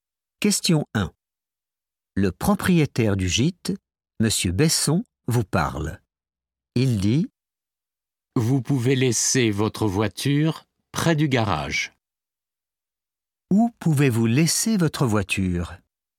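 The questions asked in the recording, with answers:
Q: Où pouvez-vous laisser votre voiture?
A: près du garage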